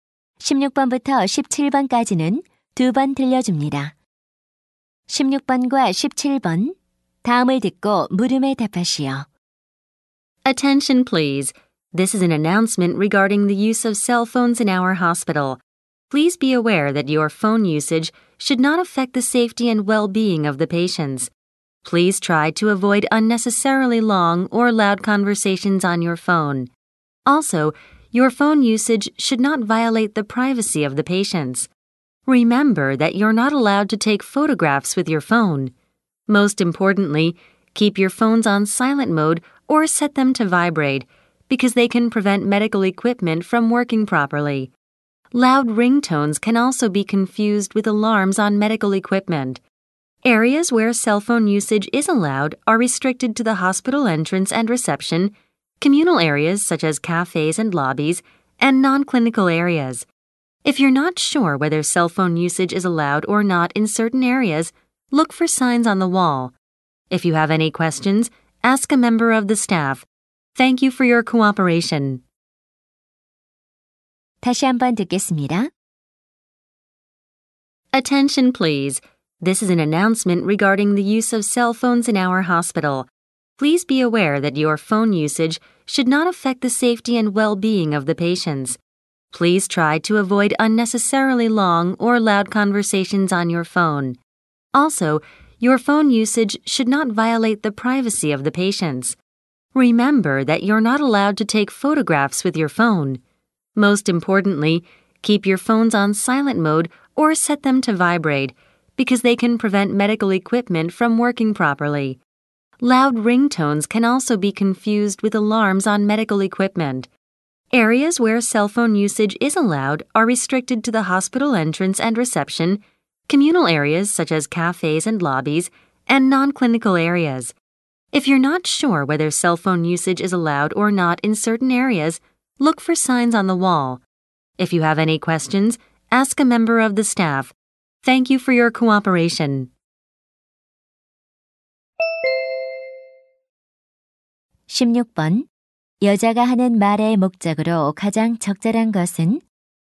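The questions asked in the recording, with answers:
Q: 여자가 하는 말의 목적으로 가장 적절한 것은?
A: 병원 내 휴대전화 사용 수칙을 안내하려고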